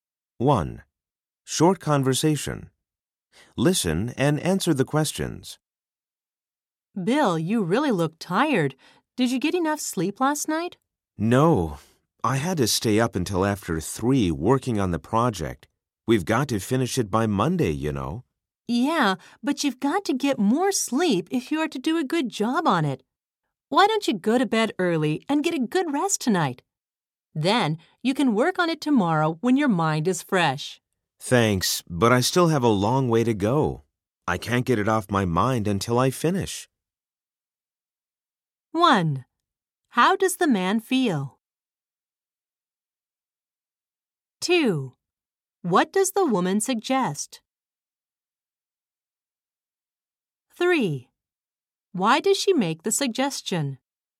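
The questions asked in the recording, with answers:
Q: How does the man feel?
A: Tired

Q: What does the woman suggest?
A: Go to bed early and get a good rest tonight

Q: Why does she make the suggestion?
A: So he can work on the project tomorrow with a fresh mind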